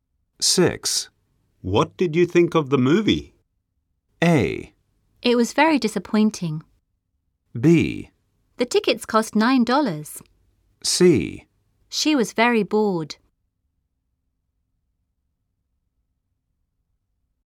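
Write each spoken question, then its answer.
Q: What did you think of the movie?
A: A: It was very disappointing.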